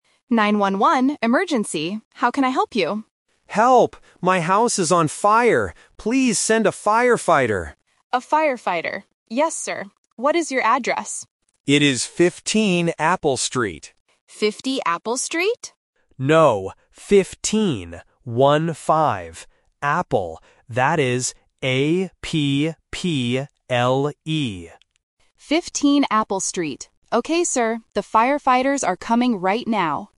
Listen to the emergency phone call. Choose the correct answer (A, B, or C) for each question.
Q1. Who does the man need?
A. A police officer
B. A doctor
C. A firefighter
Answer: A firefighter

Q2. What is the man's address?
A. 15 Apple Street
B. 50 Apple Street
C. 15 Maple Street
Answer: 15 Apple Street

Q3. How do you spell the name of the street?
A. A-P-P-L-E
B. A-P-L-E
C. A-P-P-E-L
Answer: A-P-P-L-E

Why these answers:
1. The man clearly shouts: "Please send a firefighter!" Options (A) and (B) are other emergency jobs, but they are not mentioned in the audio.
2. The man says his address is "15 Apple Street" and confirms it by saying "One-five". Option (B) is the trap because the operator mishears it as "50" first, but the man corrects her ("No, 15"). Option (C) is a distractor with a similar-sounding street name.
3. The man spells the street name very clearly: "A-P-P-L-E". Options (B) and (C) are spelling traps with missing or misplaced letters.

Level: A1

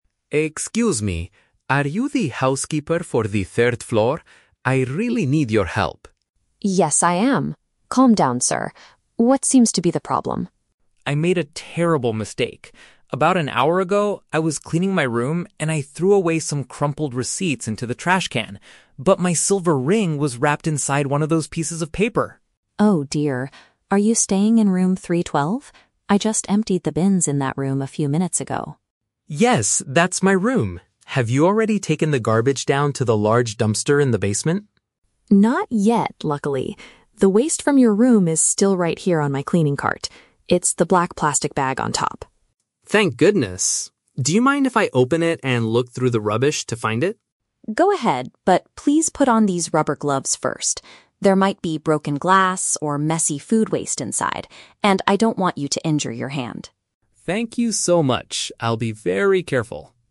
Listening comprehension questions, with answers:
Listen to the conversation between a hotel guest and a housekeeper, then choose the correct answer (A, B, or C) for each question.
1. What is the man's main problem?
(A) He accidentally discarded a valuable piece of jewelry.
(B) He lost his room key in the basement.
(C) He cannot find the receipt for his hotel payment.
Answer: He accidentally discarded a valuable piece of jewelry.

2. Where is the man's trash located at this moment?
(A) Inside the main dumpster downstairs.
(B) Still sitting inside his hotel bedroom.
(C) On the housekeeper's trolley.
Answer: On the housekeeper's trolley.

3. What does the housekeeper ask the man to do before searching?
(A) Wait for her to finish cleaning the third floor.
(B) Put on some protective hand covering.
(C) Carefully separate the glass from the food waste.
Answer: Put on some protective hand covering.

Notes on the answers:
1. Mark says he "threw away" (discarded) his "silver ring" (valuable piece of jewelry). Option (A) is a paraphrase of the situation. Option (B) is a trap; the "basement" is mentioned, but he didn't lose his key there. Option (C) is a trap; he threw away "receipts" intentionally, so finding the receipt is not his main goal.
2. Maria says the waste is "still right here on my cleaning cart." Option (C) uses the synonym "trolley" for "cleaning cart." Option (A) is a trap; Mark asks if she took it to the "dumpster in the basement" (downstairs), but she says "Not yet." Option (B) is a trap; she already "emptied the bins" in his room.
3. Maria tells Mark to "put on these rubber gloves first" so he doesn't injure his hand. Option (B) paraphrases "rubber gloves" as "protective hand covering." Option (A) is a plausible request but is never mentioned. Option (C) is a trap; "glass" and "food waste" are mentioned as dangers inside the bag, not as things Mark needs to separate.

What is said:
Mark: Excuse me! Are you the housekeeper for the third floor? I really need your help!
Maria: Yes, I am. Calm down, sir. What seems to be the problem?
Mark: I made a terrible mistake. About an hour ago, I was cleaning my room and I threw away some crumpled receipts into the trash can. But my silver ring was wrapped inside one of those pieces of paper!
Maria: Oh dear. Are you staying in room 312? I just emptied the bins in that room a few minutes ago.
Mark: Yes, that's my room! Have you already taken the garbage down to the large dumpster in the basement?
Maria: Not yet, luckily. The waste from your room is still right here on my cleaning cart. It's the black plastic bag on top.
Mark: Thank goodness! Do you mind if I open it and look through the rubbish to find it?
Maria: Go ahead, but please put on these rubber gloves first. There might be broken glass or messy food waste inside, and I don't want you to injure your hand.
Mark: Thank you so much! I'll be very careful.

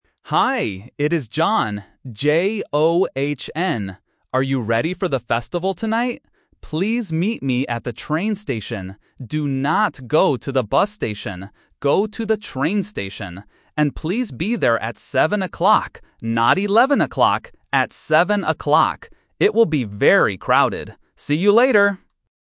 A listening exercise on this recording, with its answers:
Listen to the conversation and choose the correct answer (A, B, or C).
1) What is the caller's name?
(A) John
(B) Ron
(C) Don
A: John

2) Where will they meet tonight?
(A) At the bus station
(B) At the train station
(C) At the park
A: At the train station

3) What time will they meet?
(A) 7:00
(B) 10:00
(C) 11:00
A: 7:00

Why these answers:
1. The caller says, "Hi, it is John" and spells it clearly: "J-O-H-N". Trap: Options (B) and (C) are traps because "Ron" and "Don" sound very similar to "John".
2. John repeats the location twice: "Please meet me at the train station" and "Go to the train station." Trap: Option (A) is a classic trap. John mentions the bus station, but he says "Do not go to the bus station." Option (C) is not mentioned.
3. John says, "And please be there at 7:00" and repeats "At 7:00." Trap: Option (C) is a trap because the numbers 7 (seven) and 11 (eleven) can sound a little similar to beginners, and John specifically says "Not 11:00." Option (B) is not mentioned.

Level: A1

